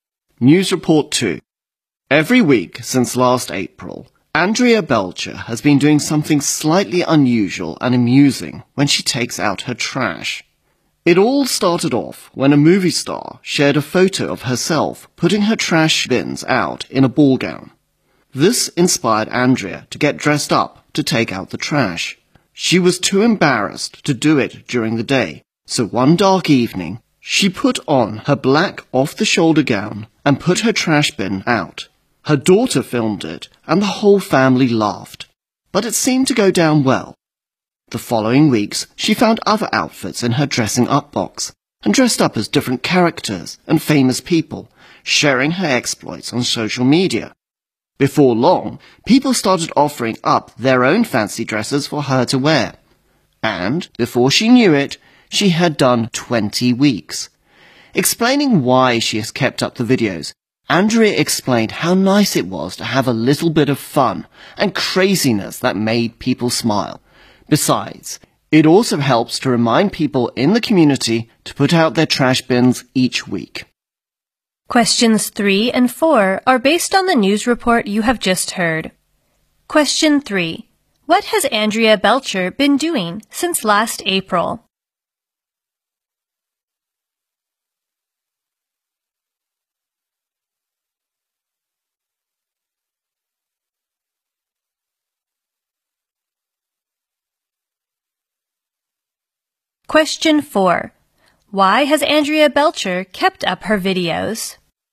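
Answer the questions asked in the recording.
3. Dressing up to take out her trash every week.
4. It's fun and makes people smile.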